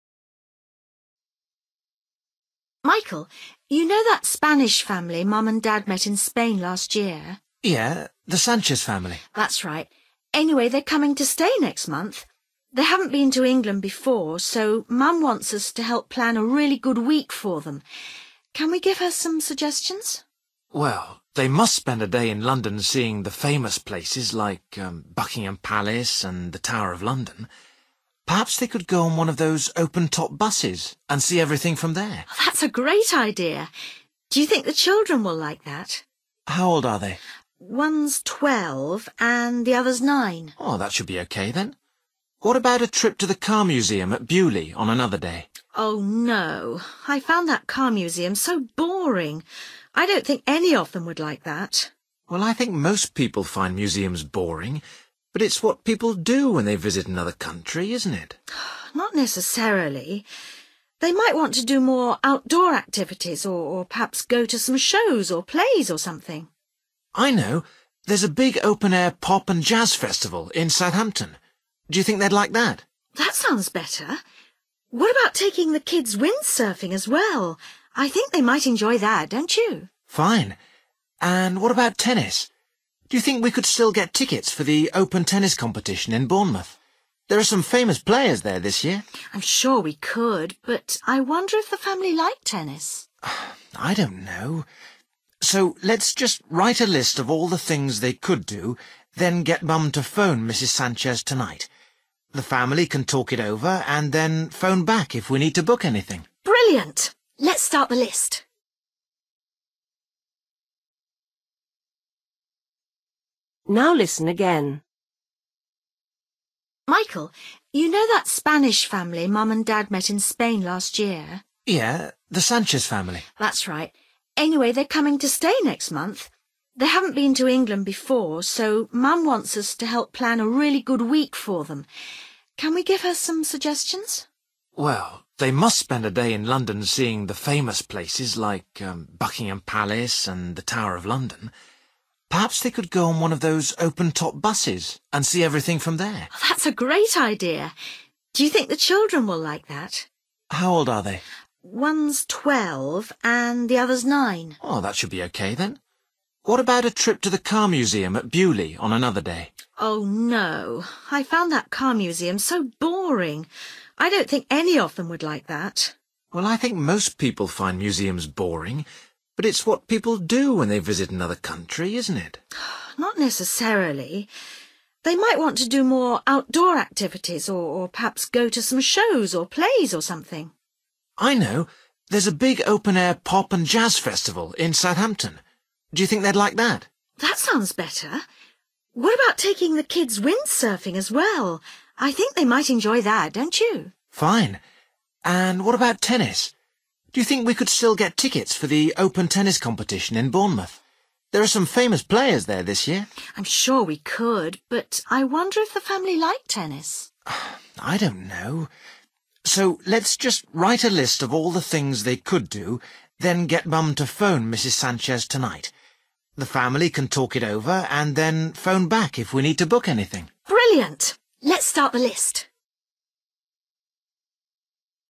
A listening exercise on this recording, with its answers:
Decide if each sentence is correct or incorrect.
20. This will be the Sanchez family's first trip to England.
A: YES

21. Michael suggests sightseeing in London.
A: YES

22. The Sanchez children are teenagers.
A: NO

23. Jane has been to the car museum.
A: YES

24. Michael thinks everyone enjoys visiting museums.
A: NO

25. Jane and Michael have bought tickets for the tennis competition.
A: NO

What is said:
Jane: Michael, you know that Spanish family Mum and Dad met in Spain last year?
Michael: Yeah, the Sanchez family.
Jane: That's right. Anyway, they're coming to stay next month. They haven't been to England before, so Mum wants us to help plan a really good week for them. Can we give her some suggestions?
Michael: Well, they must spend a day in London seeing the famous places like Buckingham Palace and the Tower of London. Perhaps they could go on one of those open top buses and see everything from there.
Jane: That's a great idea. Do you think the children will like that?
Michael: How old are they?
Jane: One's 12 and the other's nine.
Michael: That should be okay then. What about a trip to the car museum at Beaulieu on another day?
Jane: Oh no, I found that car museum so boring. I don't think any of them would like that.
Michael: Well, I think most people find museums boring, but it's what people do when they visit another country, isn't it?
Jane: Not necessarily. They might want to do more outdoor activities or perhaps go to some shows or plays or something.
Michael: I know, there's a big open air pop and jazz festival in Southampton. Do you think they'd like that?
Jane: That sounds better. What about taking the kids windsurfing as well? I think they might enjoy that, don't you?
Michael: Fine. And what about tennis? Do you think we could still get tickets for the Open Tennis competition in Bournemouth? There are some famous players there this year.
Jane: I'm sure we could, but I wonder if the family like tennis.
Michael: I don't know ... so let's just write a list of all the things they could do, then get Mum to phone Mrs Sanchez tonight. The family can talk it over and then phone back if we need to book anything.
Jane: Brilliant! Let's start the list.

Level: B1